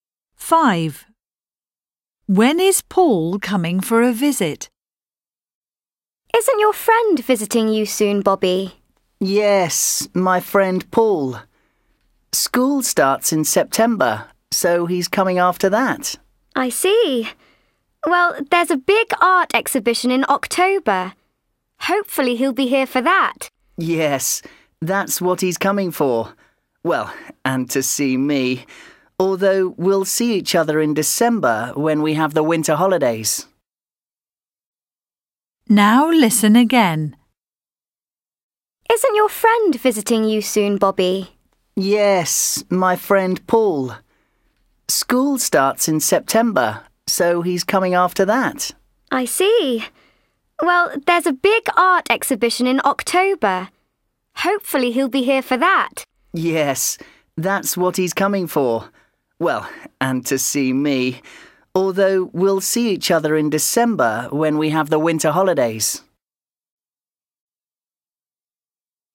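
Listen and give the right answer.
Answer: in October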